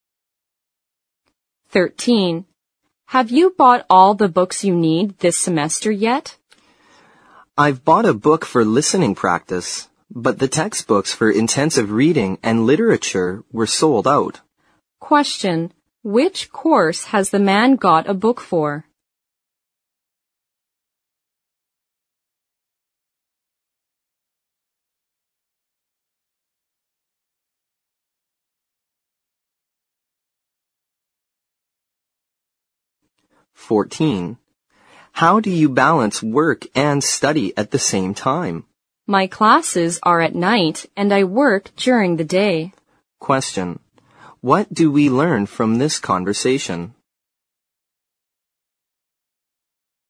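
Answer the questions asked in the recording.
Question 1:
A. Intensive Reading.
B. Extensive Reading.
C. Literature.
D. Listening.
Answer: D. Listening.
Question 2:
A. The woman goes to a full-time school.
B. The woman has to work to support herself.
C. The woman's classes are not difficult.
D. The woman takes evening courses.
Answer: D. The woman takes evening courses.

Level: 四级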